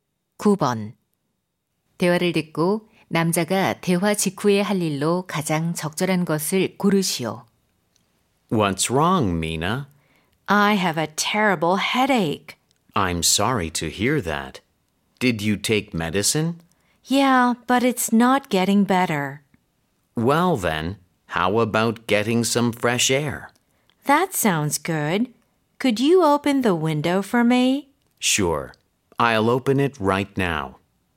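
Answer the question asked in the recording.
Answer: 창문 열기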